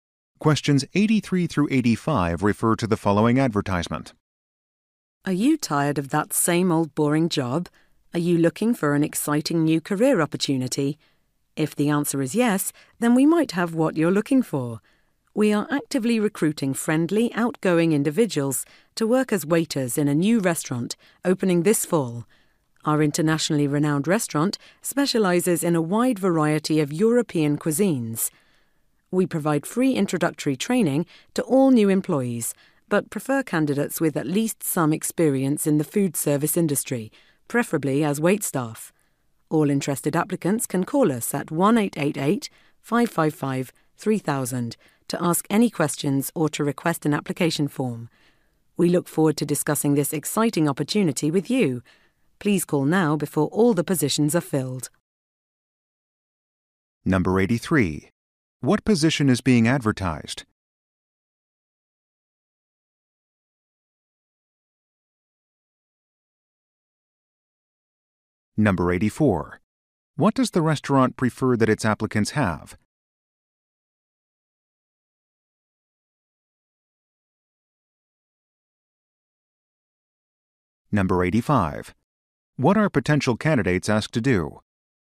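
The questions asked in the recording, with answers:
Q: What position is being advertised?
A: Waiter

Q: What does the restaurant prefer that its applicants have?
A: Experience in the food service industry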